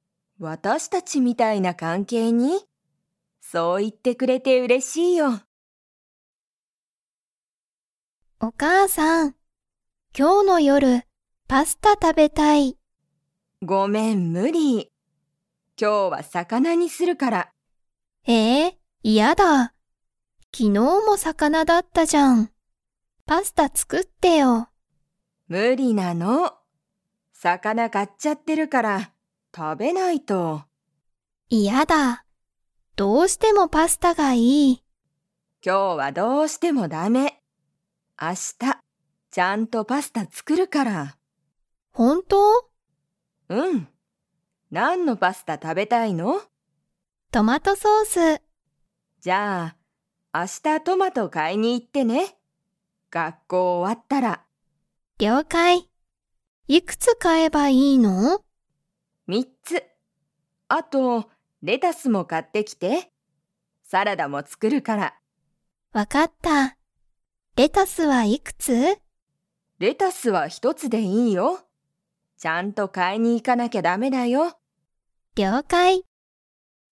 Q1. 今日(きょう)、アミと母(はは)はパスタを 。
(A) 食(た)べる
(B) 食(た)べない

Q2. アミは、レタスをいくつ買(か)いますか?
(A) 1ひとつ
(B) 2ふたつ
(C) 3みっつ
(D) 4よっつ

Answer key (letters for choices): 1B, 2A

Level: Level 3